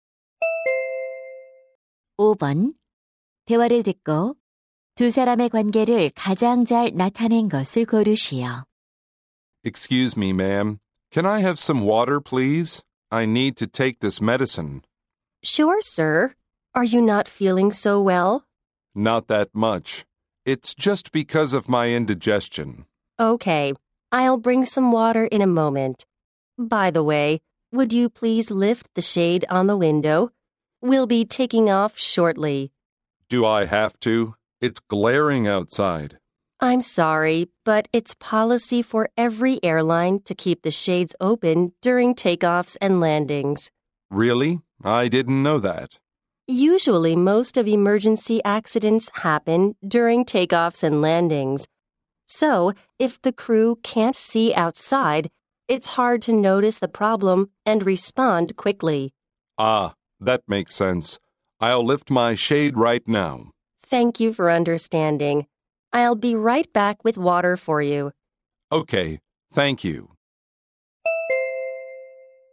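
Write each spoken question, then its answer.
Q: 대화를 듣고 두 사람의 관계를 가장 잘 나타낸 것을 고르시오.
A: 승무원 - 승객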